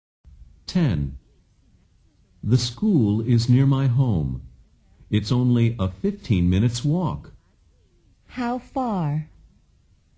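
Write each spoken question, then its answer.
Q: How far?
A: A 15-minute walk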